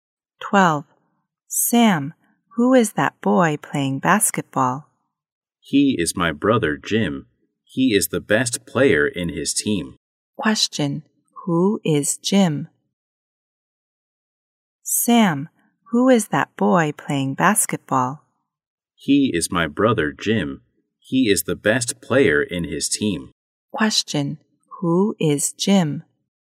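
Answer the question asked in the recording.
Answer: Sam's brother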